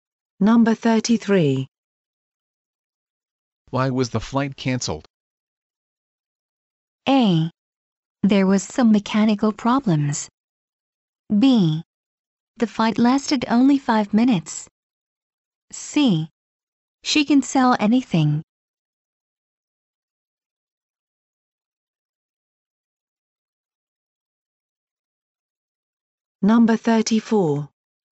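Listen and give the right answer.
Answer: A: There was some mechanical problems.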